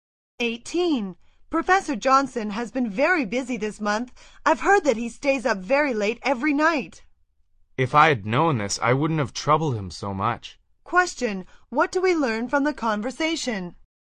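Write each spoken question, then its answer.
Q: What do we learn from the conversation?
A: The speaker regrets troubling the busy professor so much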